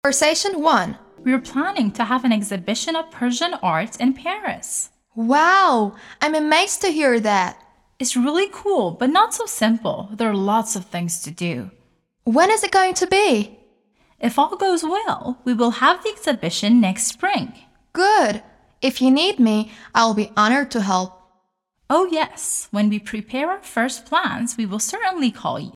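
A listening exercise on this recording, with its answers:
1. They are going to have an exhibition of Persian art in Paris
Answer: True

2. If all goes well, they will have the exhibition next spring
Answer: True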